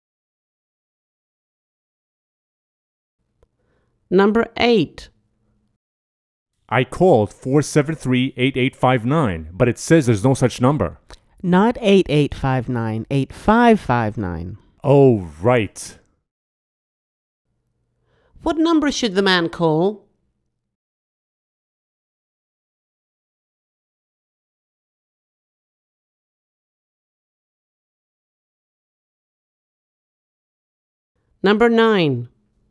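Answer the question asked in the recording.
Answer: 473-8559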